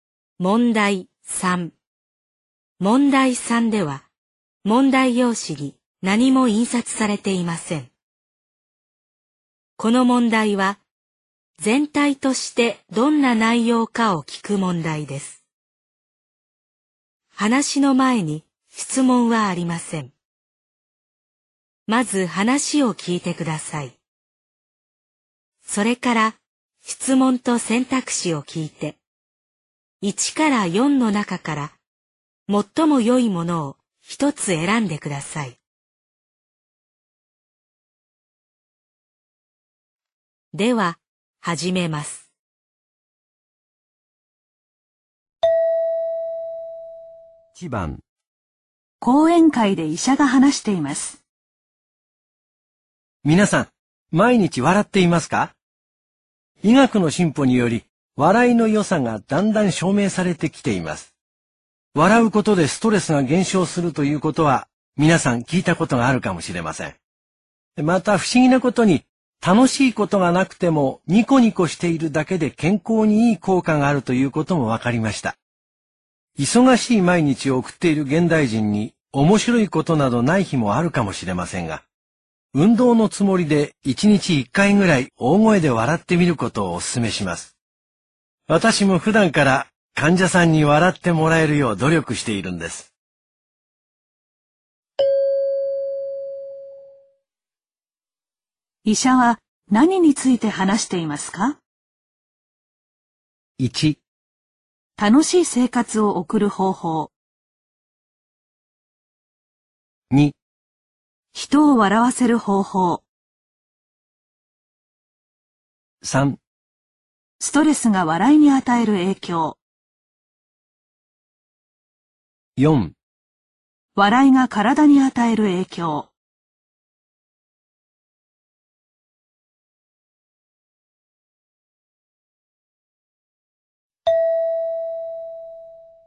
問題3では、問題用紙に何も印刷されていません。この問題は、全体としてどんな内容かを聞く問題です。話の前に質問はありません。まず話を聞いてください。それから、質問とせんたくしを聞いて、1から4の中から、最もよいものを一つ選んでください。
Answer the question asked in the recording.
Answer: 4

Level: N2